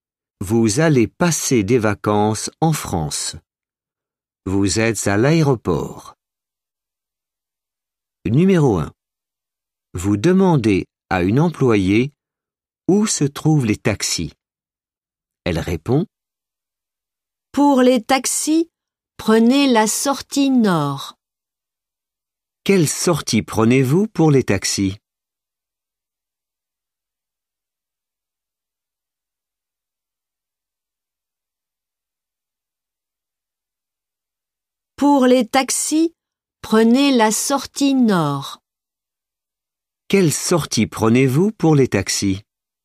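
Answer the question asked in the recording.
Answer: la sortie nord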